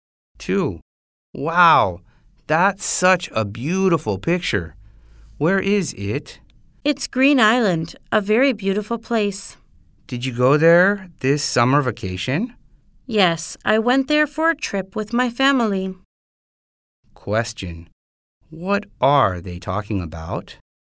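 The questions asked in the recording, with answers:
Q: Question.What are they talking about?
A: A trip to Green Island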